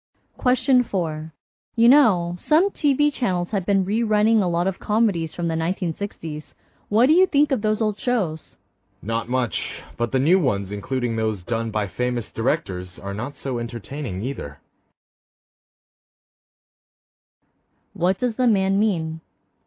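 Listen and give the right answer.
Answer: Neither the old shows nor the new ones are very entertaining.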